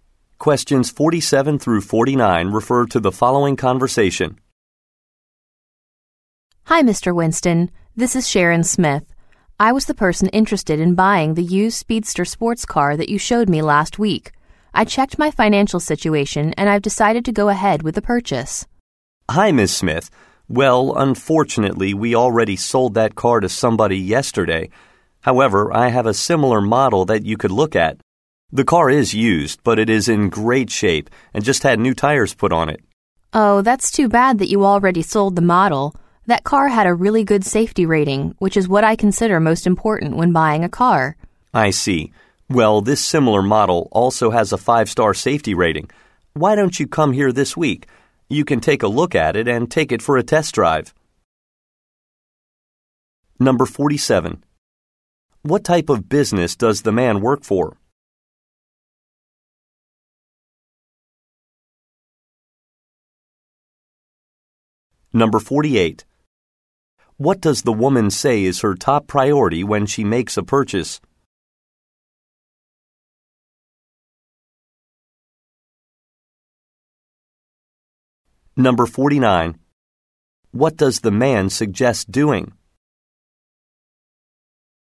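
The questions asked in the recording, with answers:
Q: What type of business does the man work for?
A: A used car dealership

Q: What does the woman say is her top priority when she makes a purchase?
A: Safety

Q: What does the man suggest doing?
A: Coming in this week to see and test-drive a similar car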